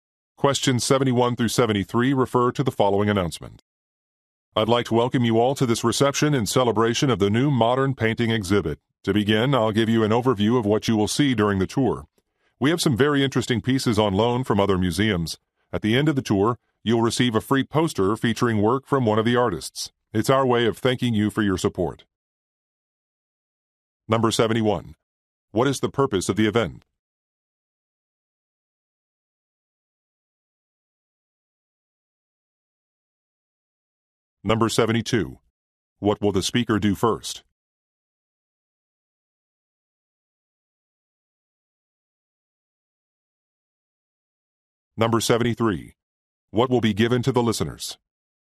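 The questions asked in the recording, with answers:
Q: What is the purpose of the event?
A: To celebrate a new modern painting exhibit

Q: What will the speaker do first?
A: Give an overview of the tour

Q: What will be given to the listeners?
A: A free poster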